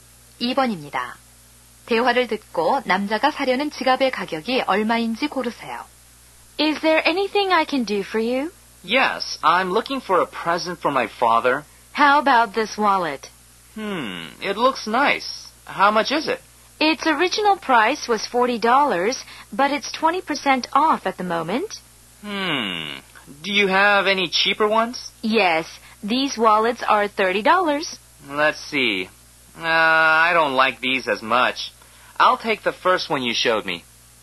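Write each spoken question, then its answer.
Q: 대화를 듣고 남자가 사려는 지갑의 가격이 얼마인지 고르세요.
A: 32달러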